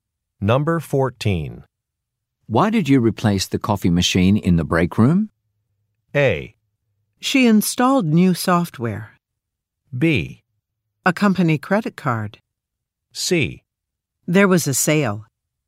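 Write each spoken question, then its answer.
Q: Why did you replace the coffee machine in the break room?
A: C: There was a sale.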